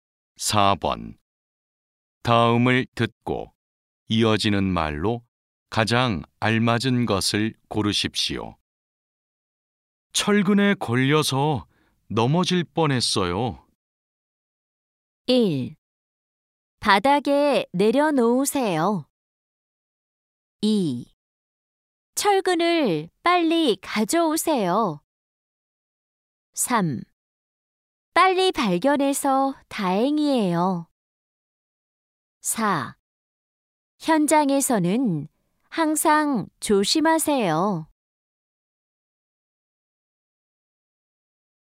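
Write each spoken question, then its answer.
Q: 다음을 듣고 이어지는 말로 가장 알맞은 것을 고르십시오.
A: 4: 현장에서는 항상 조심하세요.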